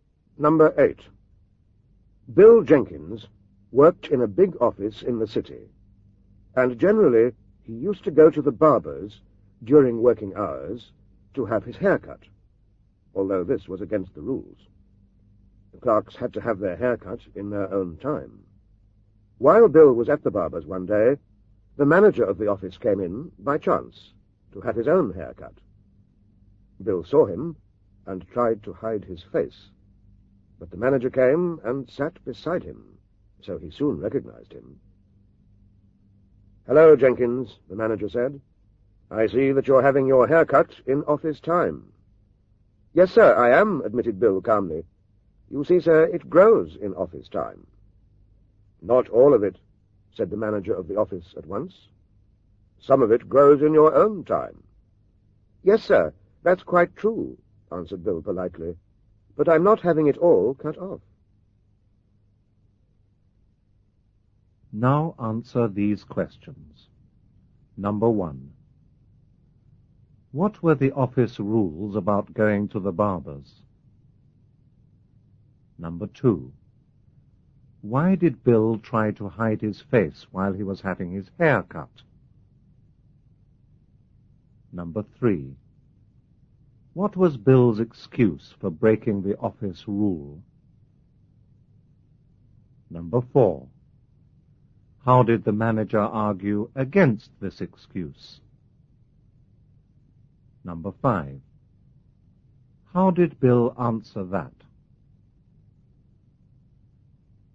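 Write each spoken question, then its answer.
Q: What were the office rules about going to the barber's?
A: Clerks had to have their hair cut in their own time

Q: Why did Bill try to hide his face while he was having his hair cut?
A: Because the manager came in and he was breaking the rules

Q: What was Bill's excuse for breaking the office rule?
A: His hair grows in office time

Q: How did the manager argue against this excuse?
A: Some of it grows in Bill's own time

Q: How did Bill answer that?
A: He said he wasn't having it all cut off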